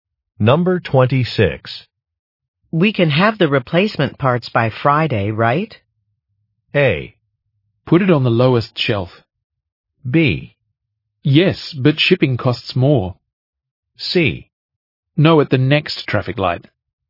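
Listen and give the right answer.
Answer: B: Yes, but shipping costs more.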